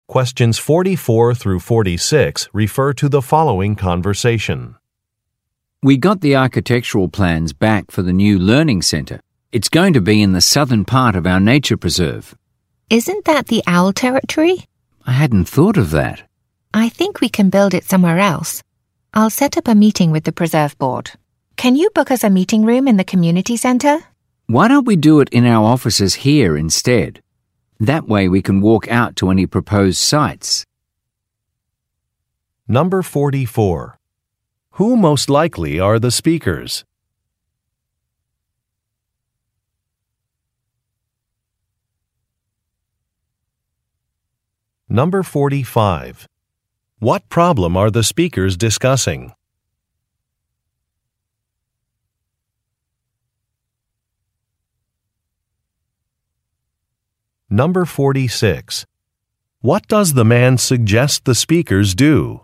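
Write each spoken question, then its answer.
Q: Who most likely are the speakers?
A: Nature preserve staff

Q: What problem are the speakers discussing?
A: The planned learning center site is in owl territory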